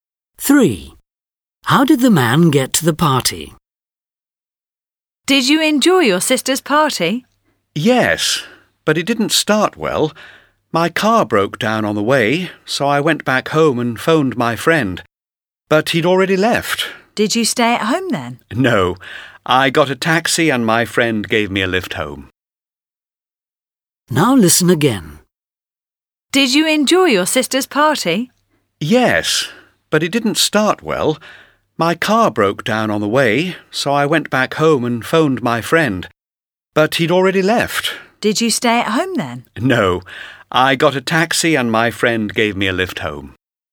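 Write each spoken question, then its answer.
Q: How did the man get to the party?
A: By taxi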